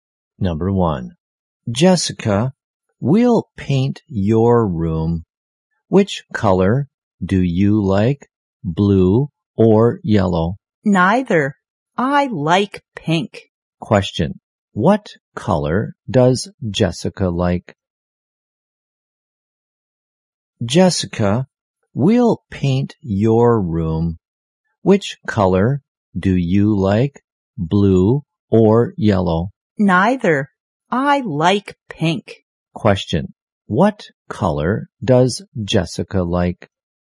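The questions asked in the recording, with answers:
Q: What color does Jessica like?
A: Pink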